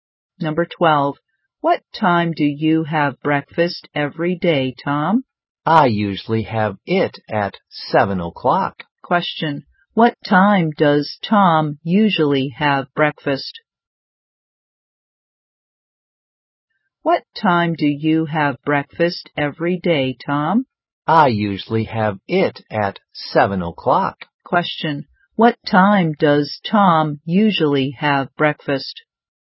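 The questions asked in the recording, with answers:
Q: What time does Tom usually have breakfast?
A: At 7 o'clock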